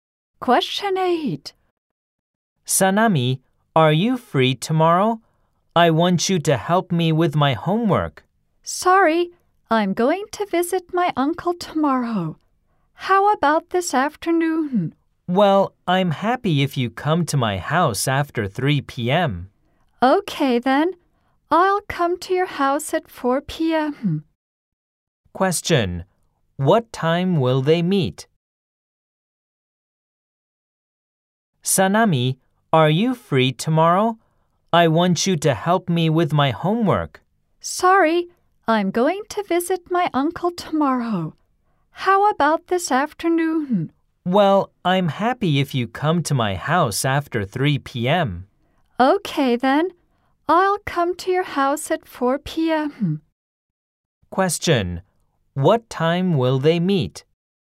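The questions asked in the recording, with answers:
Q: What time will they meet?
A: At 4 p.m. this afternoon.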